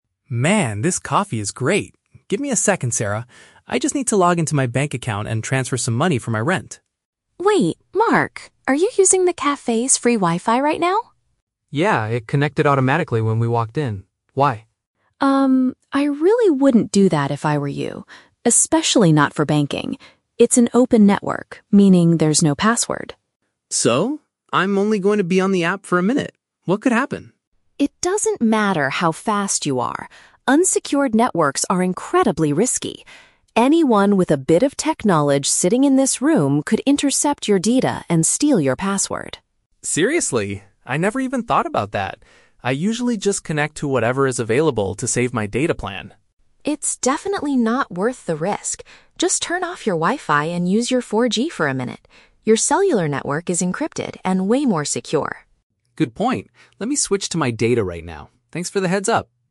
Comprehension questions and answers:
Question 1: Why does Sarah tell Mark to stop what he is doing?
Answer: She believes his current internet connection is unsafe.

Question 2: What is Mark's initial reaction to Sarah's warning?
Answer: He doesn't think there is a danger because he will only be online briefly.

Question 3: What does Sarah advise Mark to do to solve the problem?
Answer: Rely on his mobile phone's cellular connection instead.

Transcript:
Mark: Man, this coffee is great. Give me a second, Sarah. I just need to log into my bank account and transfer some money for my rent.
Sarah: Wait, Mark. Are you using the cafe's free Wi-Fi right now?
Mark: Yeah, it connected automatically when we walked in. Why?
Sarah: Um, I really wouldn't do that if I were you. Especially not for banking. It's an open network, meaning there's no password.
Mark: So? I'm only going to be on the app for a minute. What could happen?
Sarah: It doesn't matter how fast you are. Unsecured networks are incredibly risky. Anyone with a bit of tech knowledge sitting in this room could intercept your data and steal your password.
Mark: Seriously? I never even thought about that. I usually just connect to whatever is available to save my data plan.
Sarah: It's definitely not worth the risk. Just turn off your Wi-Fi and use your 4G for a minute. Your cellular network is encrypted and way more secure.
Mark: Good point. Let me switch to my data right now. Thanks for the heads-up.